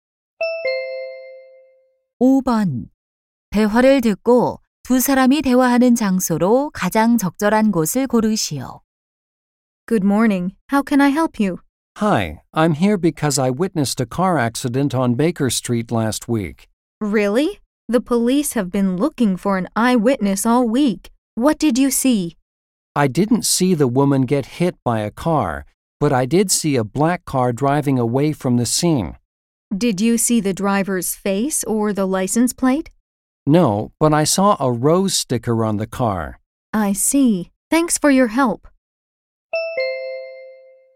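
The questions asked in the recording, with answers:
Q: 대화를 듣고 두 사람이 대화하는 장소로 가장 적절한 곳을 고르시오.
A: 경찰서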